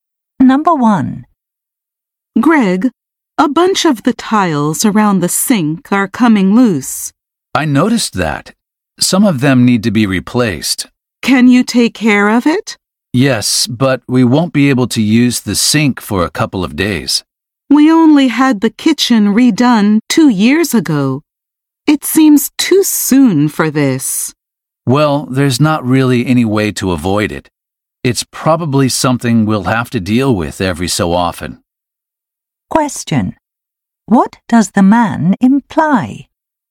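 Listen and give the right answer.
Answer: Problems like this have to be dealt with from time to time and can't be avoided.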